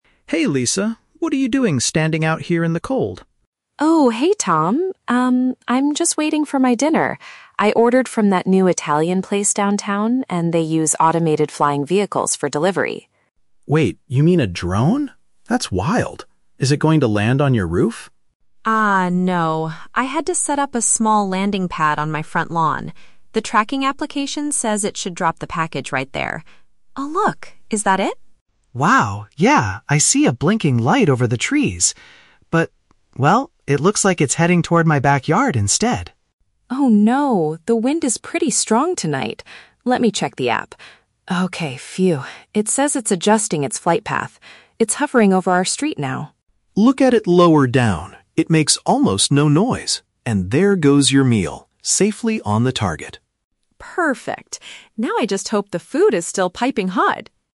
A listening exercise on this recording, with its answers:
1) Where is the food supposed to be dropped off?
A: In the grass area in front of her home.

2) What temporary issue occurs during the delivery?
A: The machine almost goes to Tom's property.

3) What is Lisa's main concern at the end of the conversation?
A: She is worried about the temperature of her dinner.

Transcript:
Tom: Hey Lisa, what are you doing standing out here in the cold?
Lisa: Oh, hey Tom. Um, I'm just waiting for my dinner. I ordered from that new Italian place downtown, and they use automated flying vehicles for delivery.
Tom: Wait, you mean a drone? That's wild. Is it going to land on your roof?
I had to set up a small landing pad on my front lawn. The tracking application says it should drop the package right there. Oh, look! Is that it?
Tom: Wow, yeah, I see a blinking light over the trees. But... well, it looks like it's heading toward my backyard instead.
Lisa: Oh no! The wind is pretty strong tonight. Let me check the app. Okay, phew, it says it's adjusting its flight path. It's hovering over our street now.
Tom: Look at it lower down. It makes almost no noise. And there goes your meal, safely on the target.
Lisa: Perfect. Now I just hope the food is still piping hot!